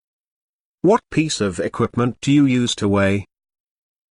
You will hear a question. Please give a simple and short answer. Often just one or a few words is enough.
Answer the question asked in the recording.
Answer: Scale